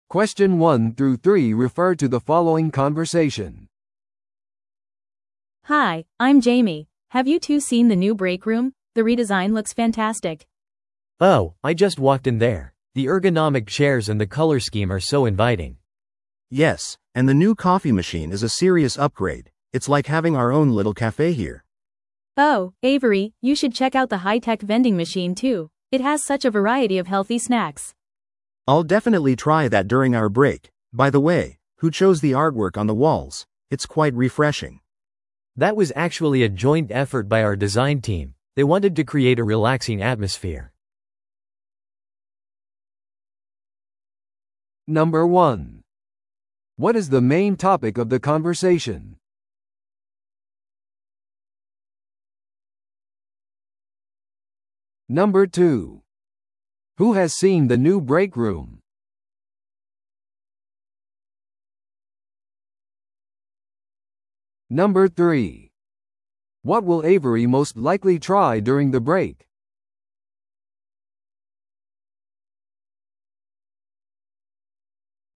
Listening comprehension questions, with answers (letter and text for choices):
Listen to the audio below and answer the questions.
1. What is the main topic of the conversation?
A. 利用可能な新しいコーヒーのフレーバーについて話し合う。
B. 改装された休憩室に感謝する。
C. オフィスの壁のアートワークを選ぶ。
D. 職場のエルゴノミックな家具を検討する。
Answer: B. 改装された休憩室に感謝する。

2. Who has seen the new break room?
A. ジェイミーだけ。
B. ジェイミーとエイブリー。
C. 話者全員。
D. 会話内の男性のみ。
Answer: C. 話者全員。

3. What will Avery most likely try during the break?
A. 新しいハイテク自動販売機。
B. いくつかのコーヒーフレーバー。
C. 人間工学に基づいた椅子。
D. デザインチームに参加する。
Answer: A. 新しいハイテク自動販売機。

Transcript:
Have you two seen the new break room? The redesign looks fantastic!
B: Oh, I just walked in there. The ergonomic chairs and the color scheme are so inviting.
C: Yes, and the new coffee machine is a serious upgrade. It's like having our own little café here!
A: Oh, Avery, you should check out the high-tech vending machine too. It has such a variety of healthy snacks.
C: I'll definitely try that during our break. By the way, who chose the artwork on the walls? It's quite refreshing.
B: That was actually a joint effort by our design team. They wanted to create a relaxing atmosphere.